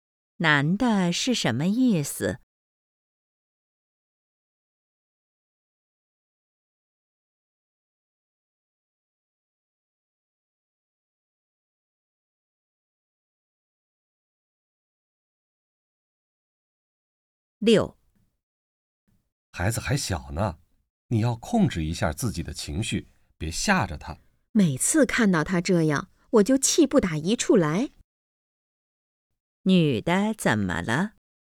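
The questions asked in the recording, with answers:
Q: 女的怎么了?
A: 她很生气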